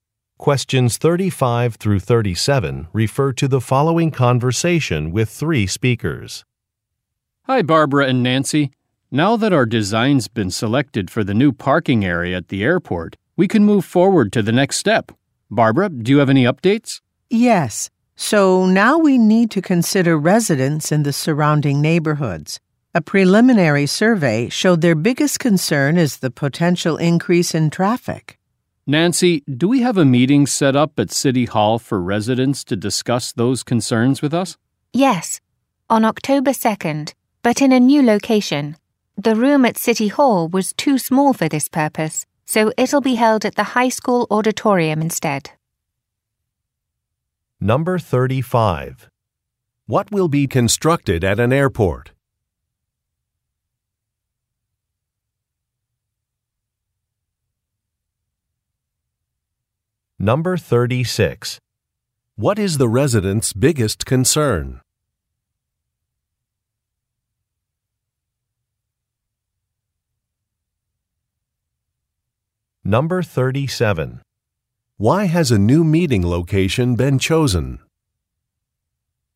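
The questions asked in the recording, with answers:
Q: What will be constructed at an airport?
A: A new parking area

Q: What is the resident's biggest concern?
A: A potential increase in traffic

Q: Why has a new meeting location been chosen?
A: The room at City Hall was too small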